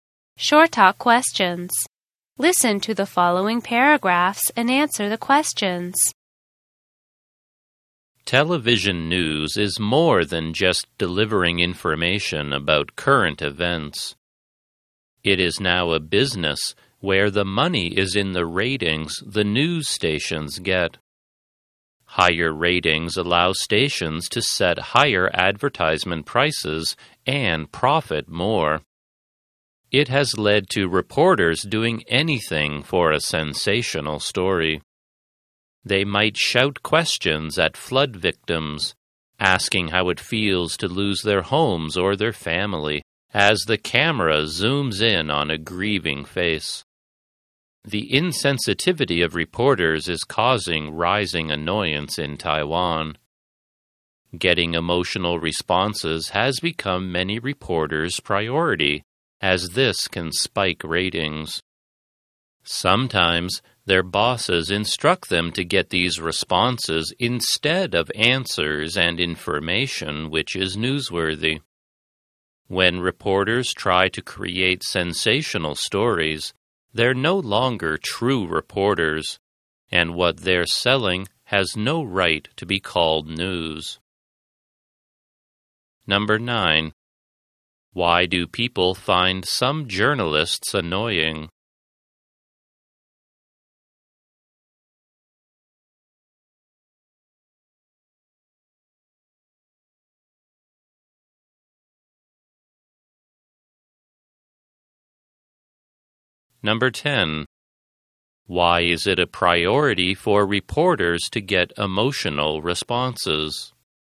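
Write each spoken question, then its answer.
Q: Why do people find some journalists annoying?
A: They are insensitive, e.g. shouting questions at grieving victims

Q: Why is it a priority for reporters to get emotional responses?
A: Emotional responses can raise ratings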